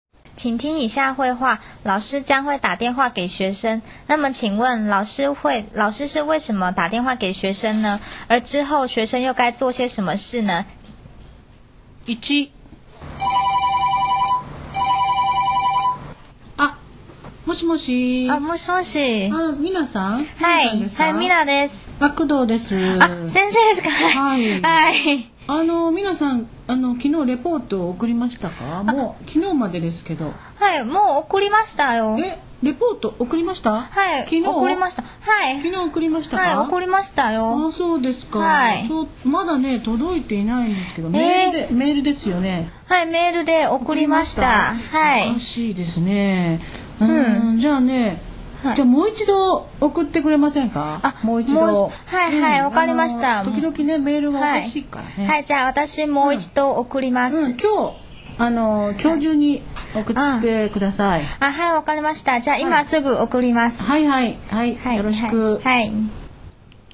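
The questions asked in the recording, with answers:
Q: 那么请问老师是为什么打电话给学生呢?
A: 老师没有收到学生昨天用邮件发的报告

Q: 而之后学生又该做些什么事呢?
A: 今天之内再用邮件发一次报告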